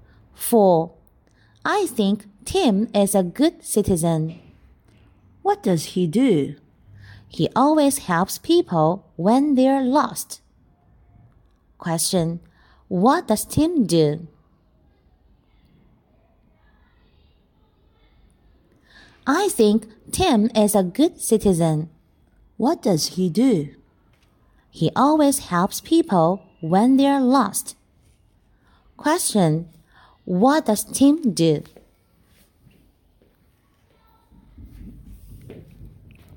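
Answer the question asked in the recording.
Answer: He always helps people when they're lost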